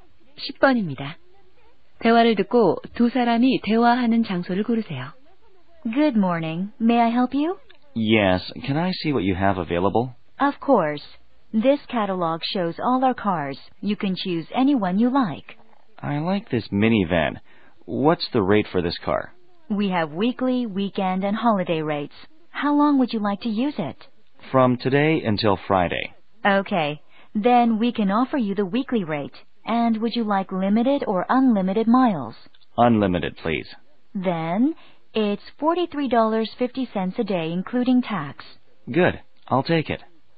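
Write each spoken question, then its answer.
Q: 대화를 듣고 두 사람이 대화하는 장소를 고르세요.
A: 렌터카 회사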